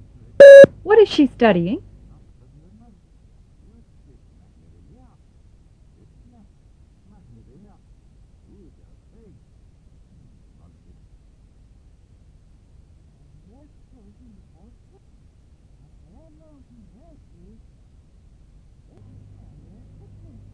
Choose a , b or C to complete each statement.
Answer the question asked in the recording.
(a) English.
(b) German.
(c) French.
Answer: (a) English.